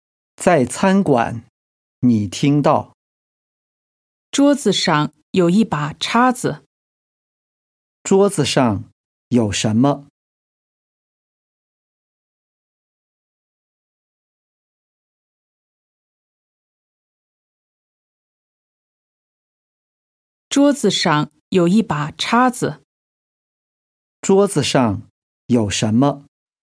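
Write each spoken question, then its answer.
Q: 桌子上有什么?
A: 一把叉子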